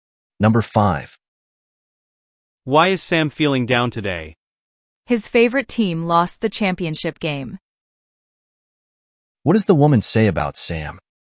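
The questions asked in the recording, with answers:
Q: What does the woman say about Sam?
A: His favorite team lost the championship game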